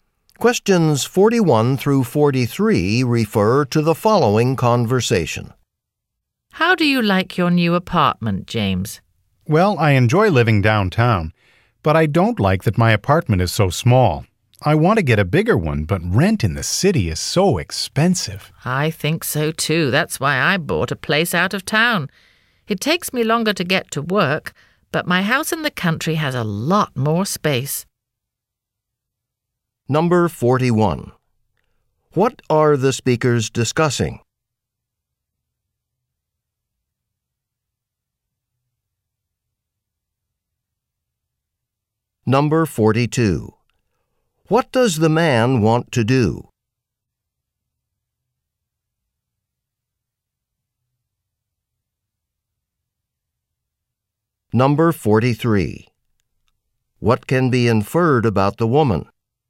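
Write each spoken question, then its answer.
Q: What are the speakers discussing?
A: Their homes / housing

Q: What does the man want to do?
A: Get a bigger apartment

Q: What can be inferred about the woman?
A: She lives in a house out of town and has a longer commute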